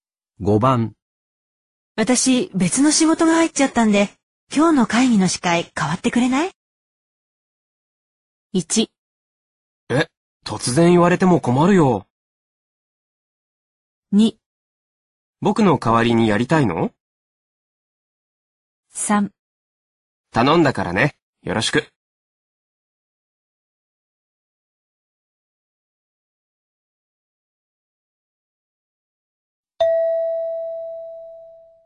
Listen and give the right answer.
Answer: 1

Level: N2